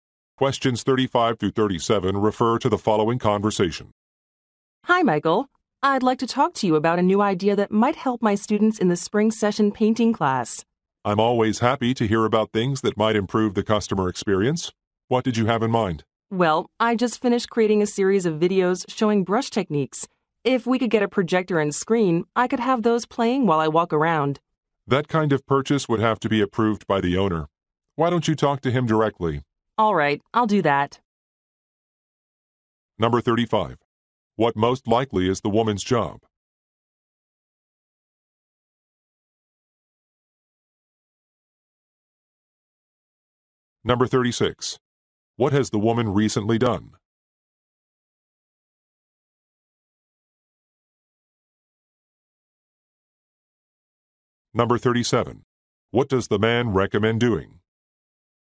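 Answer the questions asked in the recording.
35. Painting instructor
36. Created a series of videos on brush techniques
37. Talking to the owner directly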